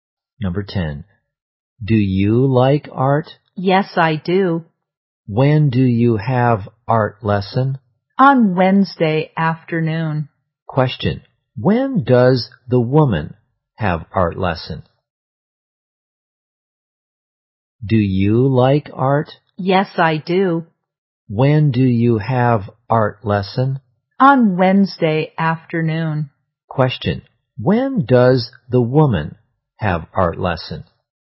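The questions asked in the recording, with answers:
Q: When does the woman have art lesson?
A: On Wednesday afternoon.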